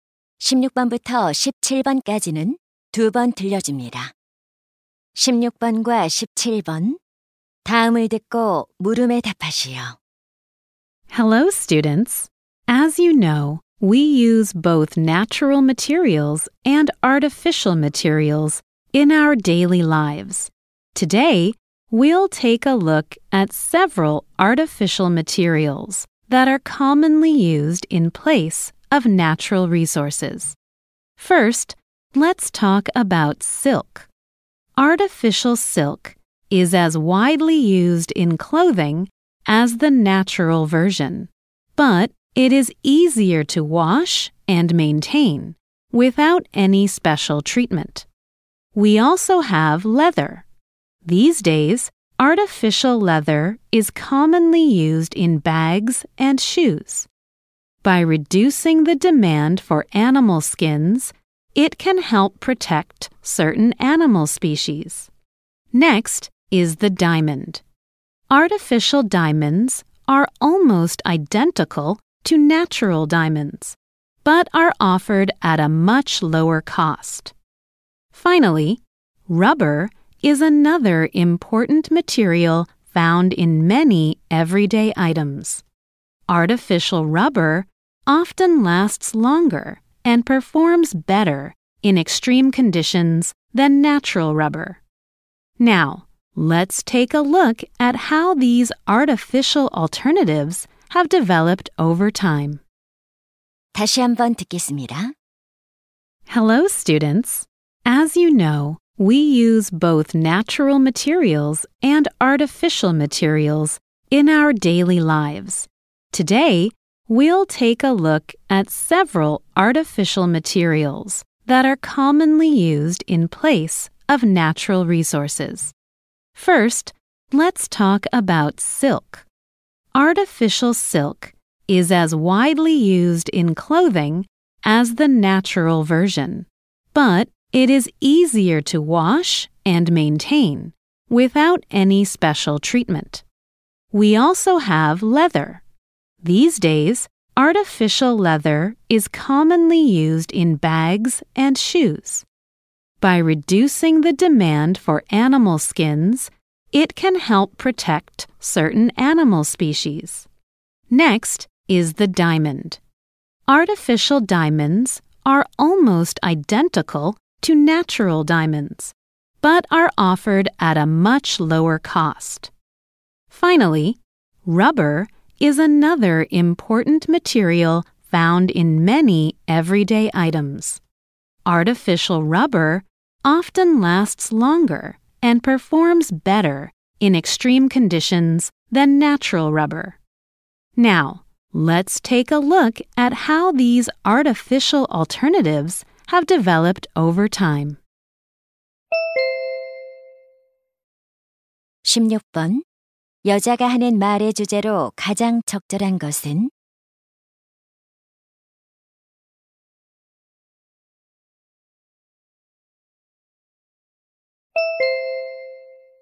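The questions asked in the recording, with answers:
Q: 여자가 하는 말의 주제로 가장 적절한 것은?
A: 천연 자원을 대신해 흔히 쓰이는 인공 재료들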